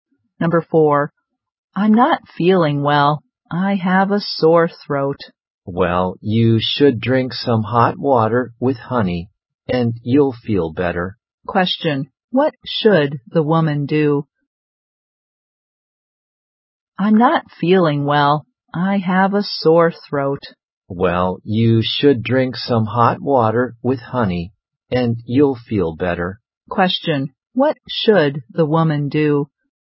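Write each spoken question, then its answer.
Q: what should the woman do?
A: Drink some hot water with honey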